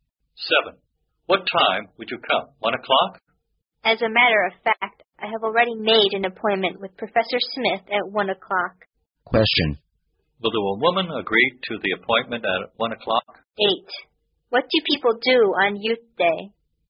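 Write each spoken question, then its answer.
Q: Will the woman agree to the appointment at 1 o'clock?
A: No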